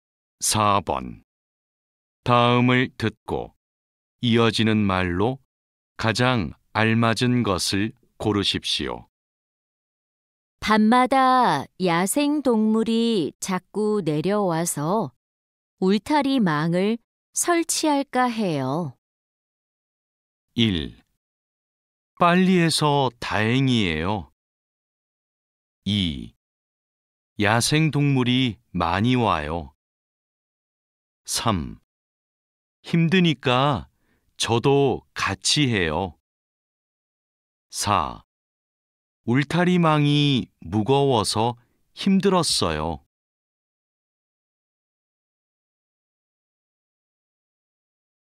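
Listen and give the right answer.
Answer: 3: 힘드니까 저도 같이 해요.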